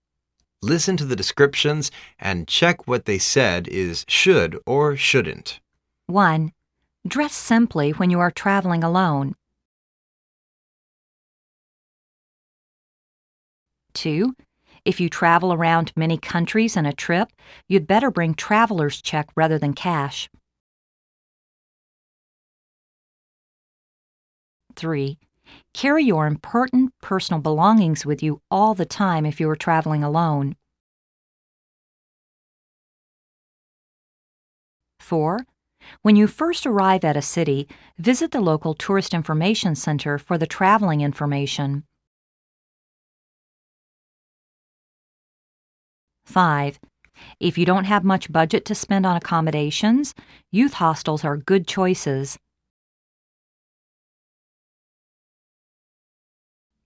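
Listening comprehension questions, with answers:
Listen to the descriptions and check whether they said is "should" or "shouldn't".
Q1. Dress sim ply when you are traveling alone.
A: should

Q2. If you travel around many countries in a trip, you'd better bring traveler's check rather than cash.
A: should

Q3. Carry your important personal belongings with you all the time if you are traveling alone.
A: should

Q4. When you first arrive at a city, visit the local tourist information center for the traveling info rmation.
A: should

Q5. If you don't have much budget to spend on accommodations,Youth Hostels are good choices.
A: should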